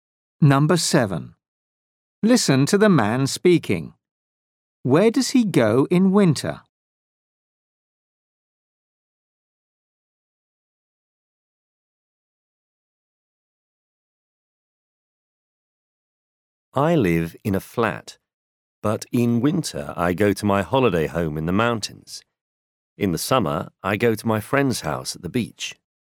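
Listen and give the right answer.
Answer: his holiday home in the mountains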